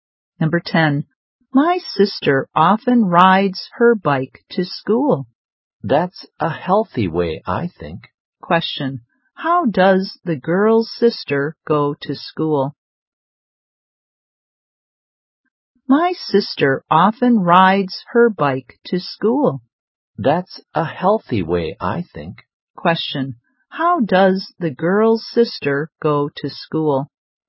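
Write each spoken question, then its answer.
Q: How does the girl's sister go to school?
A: By bike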